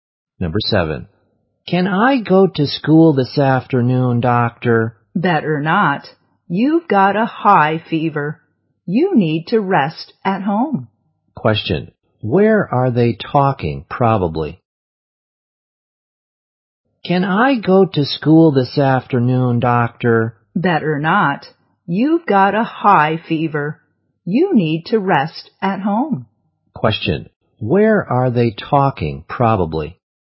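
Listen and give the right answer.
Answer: In a hospital (at the doctor's)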